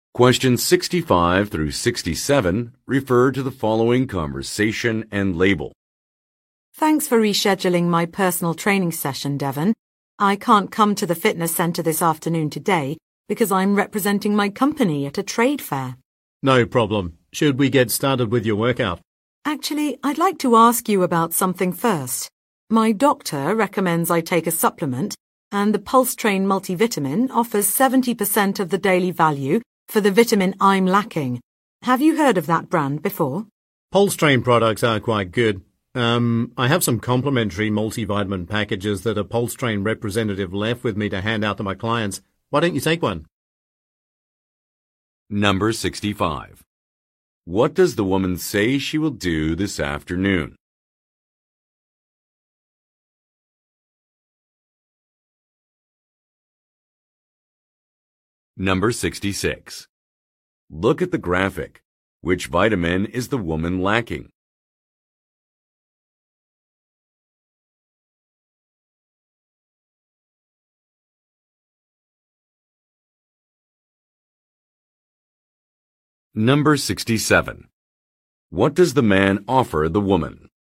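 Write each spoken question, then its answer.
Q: What does the woman say she will do this afternoon?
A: Represent her company at a trade fair

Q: What does the man offer the woman?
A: A complimentary multivitamin package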